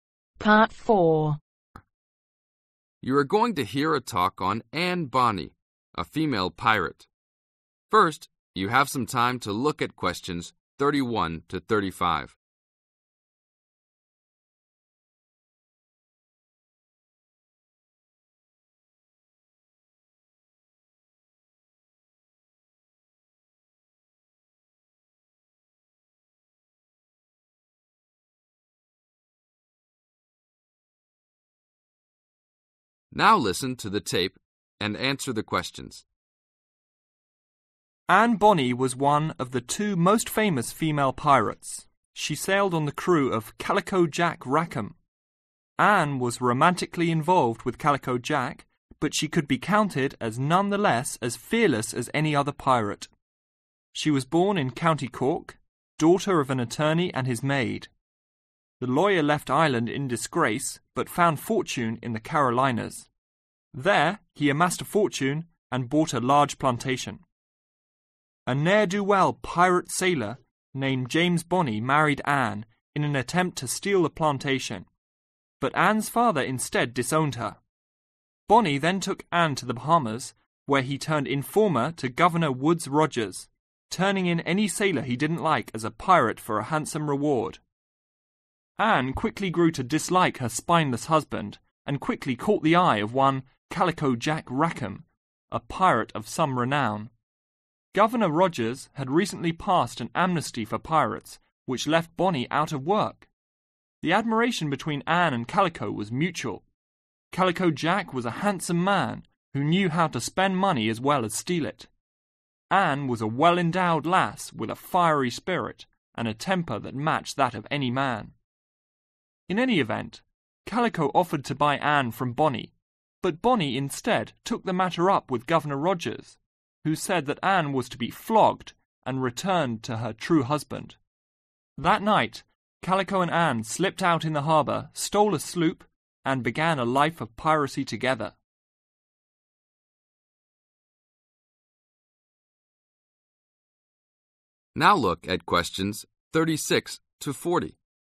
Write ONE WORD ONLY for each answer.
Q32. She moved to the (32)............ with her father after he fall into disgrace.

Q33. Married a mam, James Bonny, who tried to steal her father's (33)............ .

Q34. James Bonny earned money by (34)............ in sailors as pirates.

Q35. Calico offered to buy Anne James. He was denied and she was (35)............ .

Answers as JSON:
{"32": "Carolinas", "33": "Plantation", "34": "Turning", "35": "Flogged"}